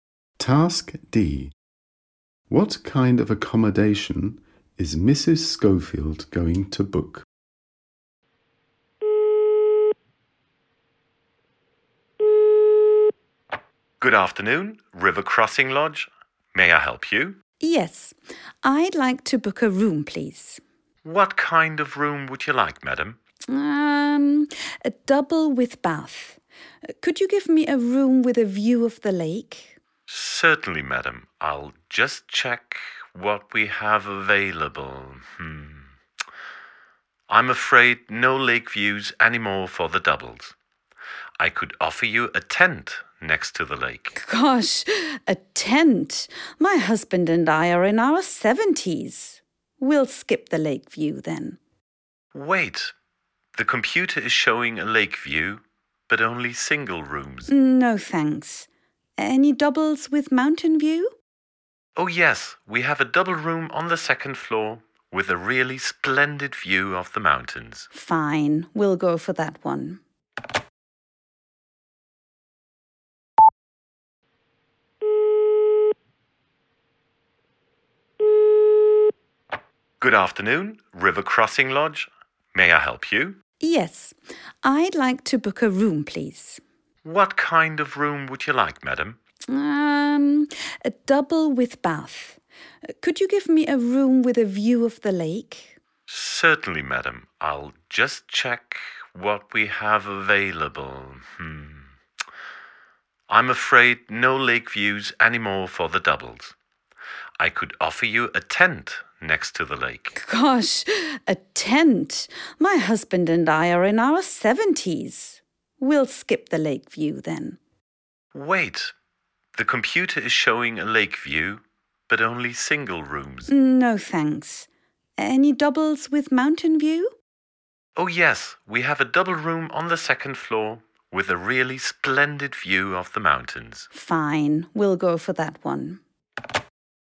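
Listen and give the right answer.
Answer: A double room with a view of the mountains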